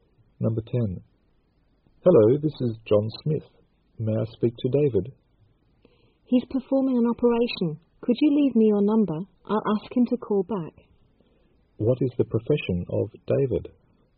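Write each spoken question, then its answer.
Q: What is the profession of David?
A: A doctor (surgeon)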